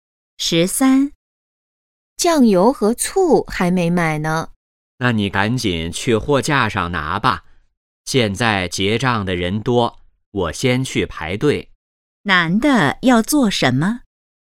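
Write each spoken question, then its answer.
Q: 男的要做什么?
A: 去排队结账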